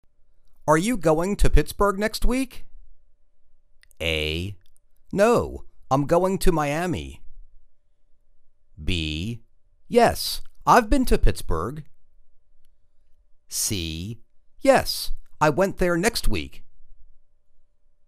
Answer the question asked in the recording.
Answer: No, I'm going to Miami.